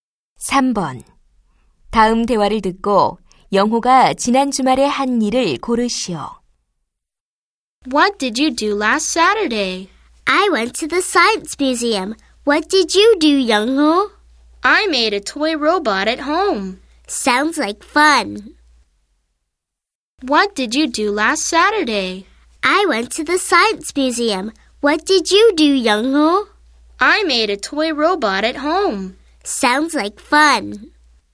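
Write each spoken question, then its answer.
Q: 다음 대화를 듣고 영호가 지난 주말에 한 일을 고르시오.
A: 집에서 장난감 로봇을 만들었다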